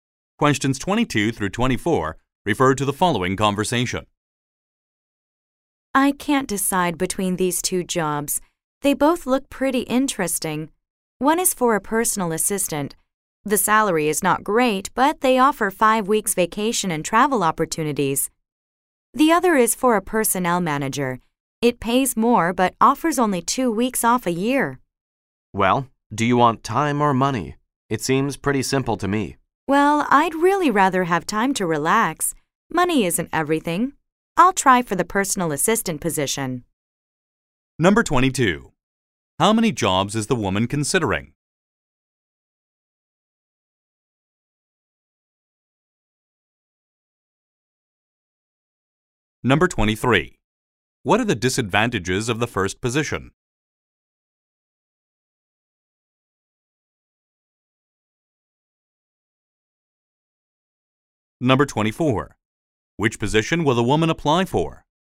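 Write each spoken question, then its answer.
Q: How many jobs is the woman considering?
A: Two

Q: What are the disadvantages of the first position?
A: The salary is not great

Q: Which position will the woman apply for?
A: Personal assistant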